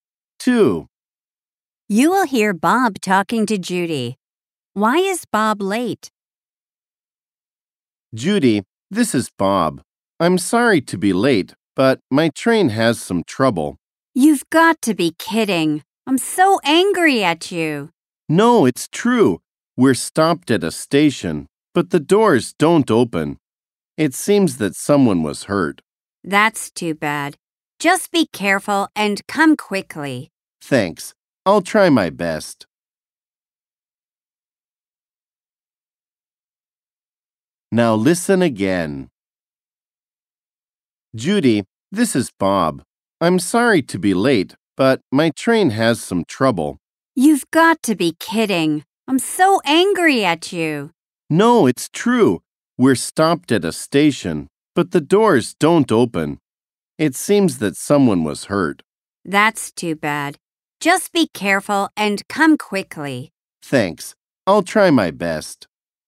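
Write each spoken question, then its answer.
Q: Why is Bob late?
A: His train has trouble (stopped at a station and the doors don't open)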